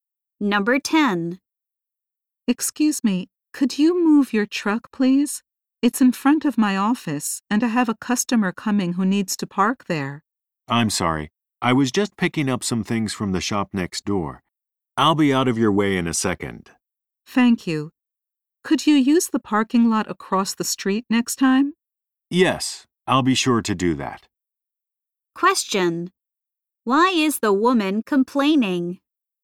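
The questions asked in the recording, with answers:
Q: Why is the woman complaining?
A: The man's truck is parked in front of her office.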